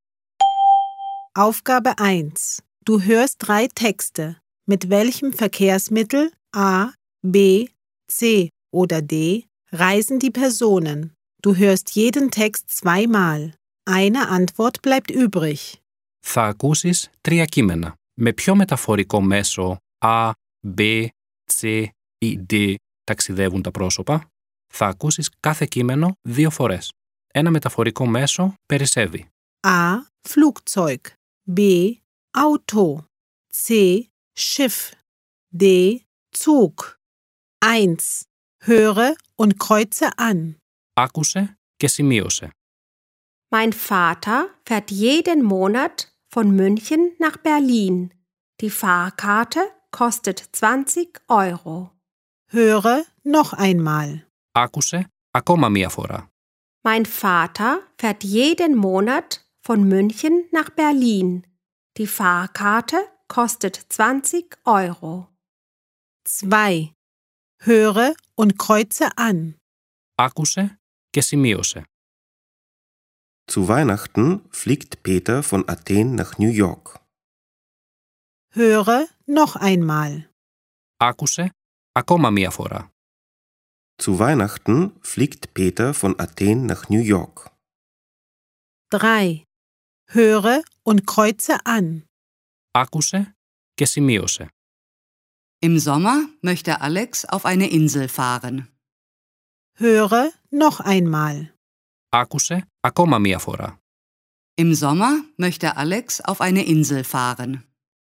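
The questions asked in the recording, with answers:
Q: Mit welchem Verkehrsmittel A, B, C oder D reisen die Personen?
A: A: Flugzeug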